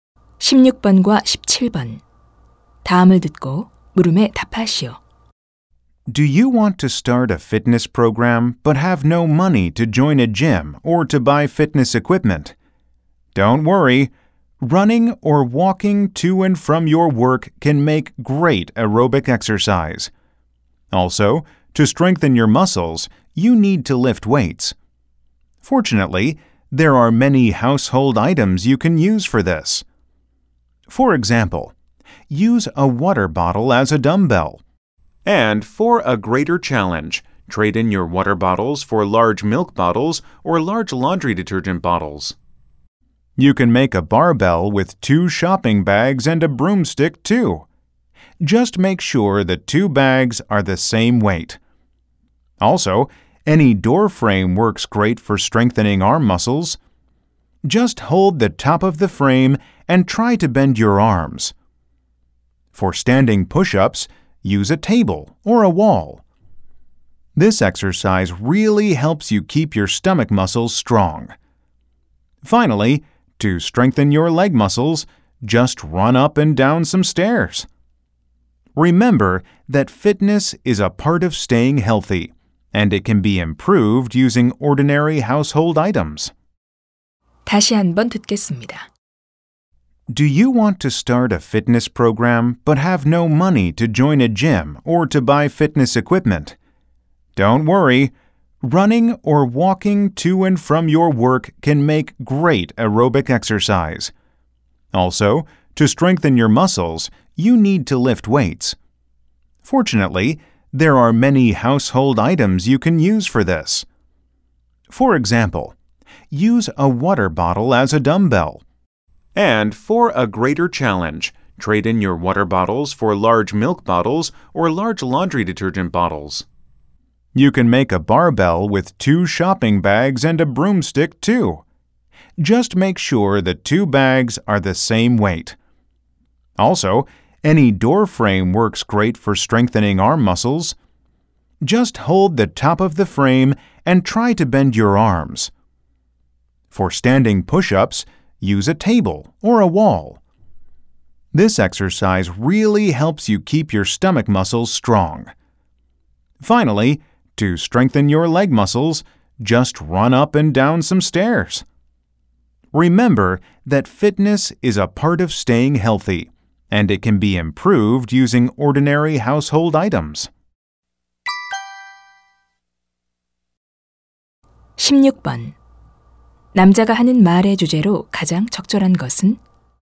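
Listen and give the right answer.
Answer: 생활용품을 이용한 운동 방법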